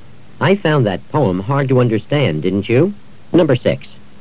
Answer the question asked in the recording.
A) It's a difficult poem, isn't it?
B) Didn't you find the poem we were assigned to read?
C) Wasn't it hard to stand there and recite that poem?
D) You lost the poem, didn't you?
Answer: A) It's a difficult poem, isn't it?

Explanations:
I found that poem hard to understand, didn't you?

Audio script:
4. Dick's parents made him spend his vacation at home.
5. I found that poem hard to understand, didn't you?